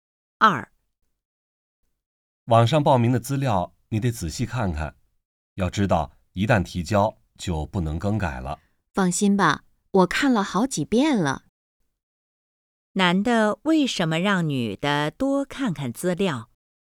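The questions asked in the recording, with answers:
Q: 男的为什么让女的多看看资料?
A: 因为一旦提交就不能更改了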